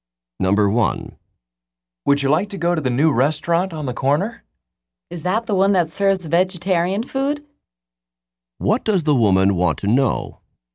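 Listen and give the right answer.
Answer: Whether the new restaurant serves vegetarian food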